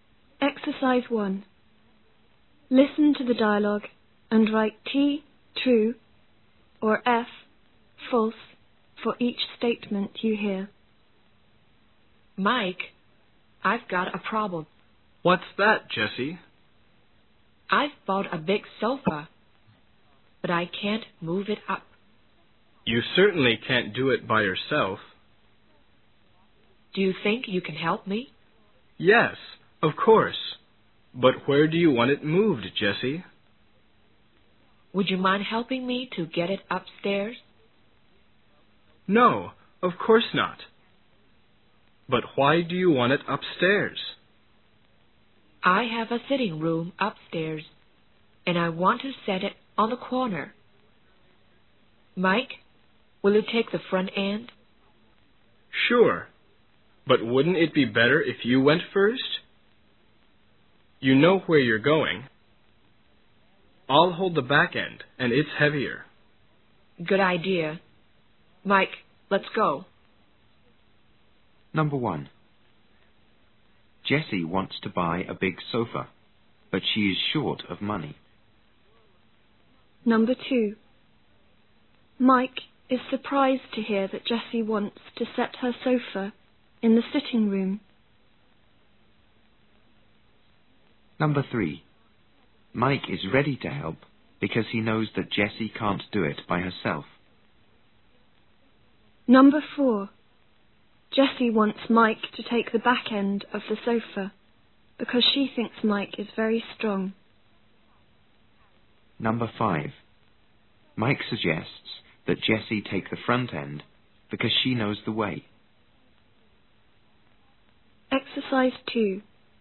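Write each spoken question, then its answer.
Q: Jessie wants to buy a big sofa, but she is short of money.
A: False

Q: Mike is ready to help because he knows that Jessie can't do it by herself.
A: True

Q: Jessie wants Mike to take the back end of the sofa because she thinks Mike is very strong.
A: False

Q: Mike suggests that Jessie take the front end because she knows the way.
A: True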